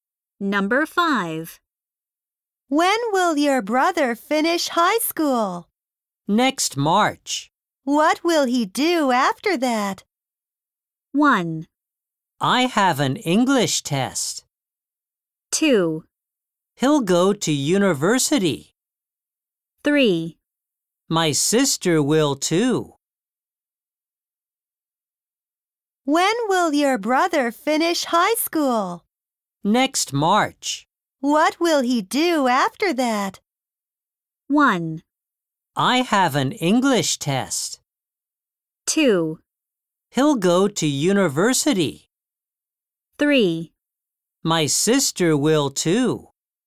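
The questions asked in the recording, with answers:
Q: What will he do after that?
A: 2: He'll go to university.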